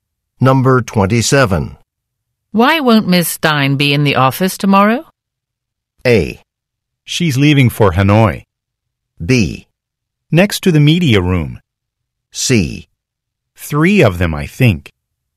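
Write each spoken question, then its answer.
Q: Why won't Ms. Stein be in the office tomorrow?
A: A: She's leaving for Hanoi.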